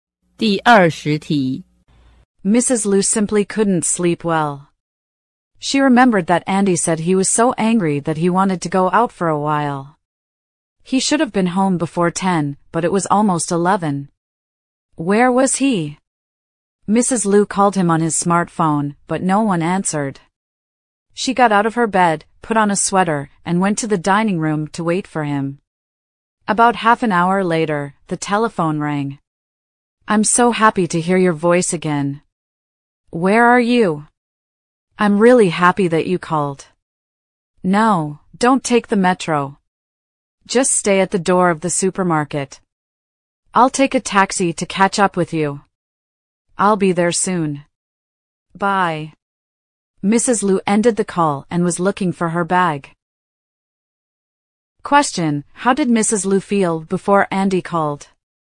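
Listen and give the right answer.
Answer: Worried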